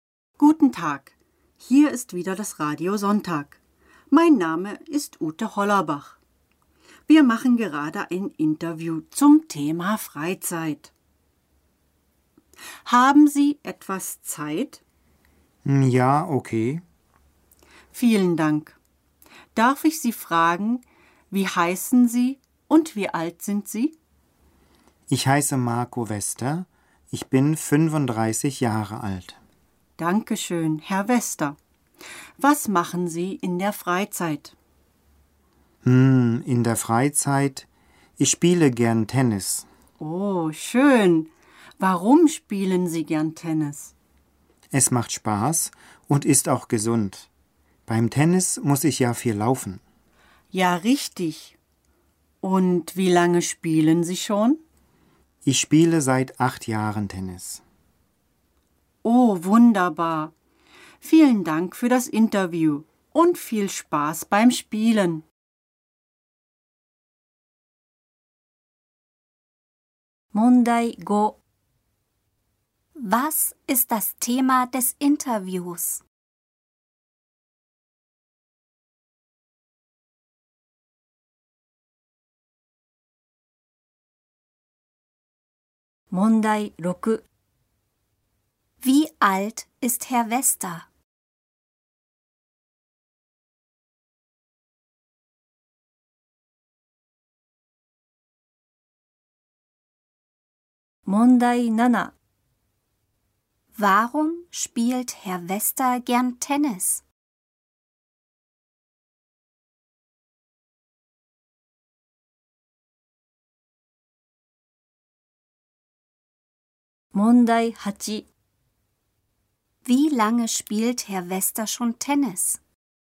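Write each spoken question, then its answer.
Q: Was ist das Thema des Interviews?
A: Freizeit

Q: Wie alt ist Herr Wester?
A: 35 Jahre alt

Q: Warum spielt Herr Wester gern Tennis?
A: Es macht Spaß und ist gesund

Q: Wie lange spielt Herr Wester schon Tennis?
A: Seit 8 Jahren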